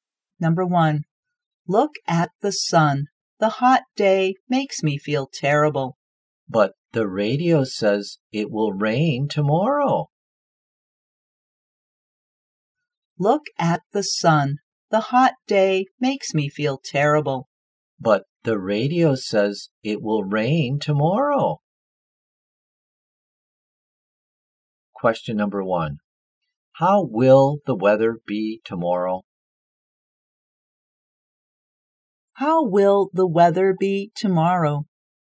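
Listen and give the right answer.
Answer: Rainy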